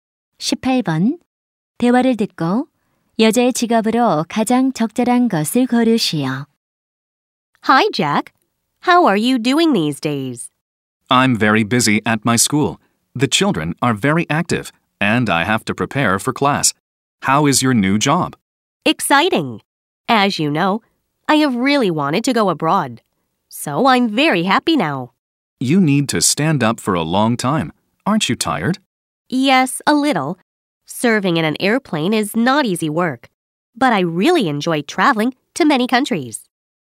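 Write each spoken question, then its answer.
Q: 대화를 듣고 여자의 직업으로 가장 적절한 것을 고르시오.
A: 승무원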